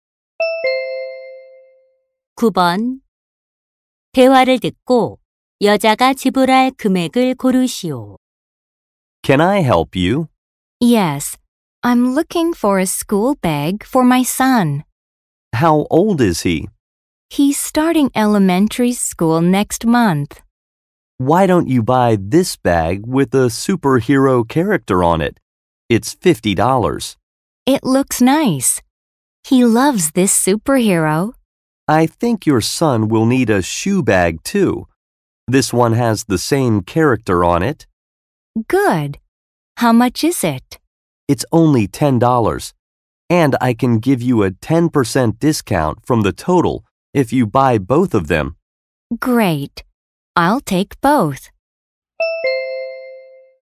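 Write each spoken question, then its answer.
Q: 대화를 듣고 여자가 지불할 금액을 고르시오.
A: $54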